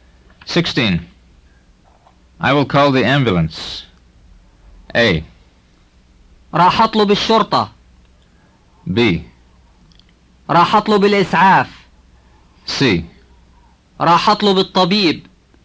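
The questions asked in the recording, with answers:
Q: I will call the ambulance.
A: B: راح أطلب الإسعاف.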